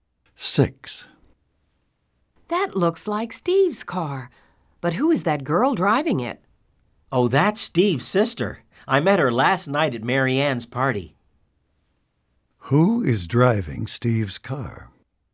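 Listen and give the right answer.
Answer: Steve's sister.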